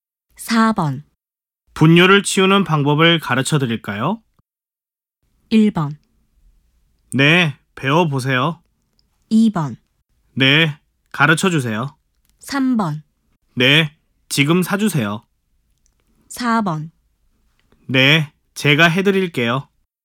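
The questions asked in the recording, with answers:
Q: 분뇨를 치우는 방법을 가르쳐 드릴까요?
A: 2: 네, 가르쳐 주세요.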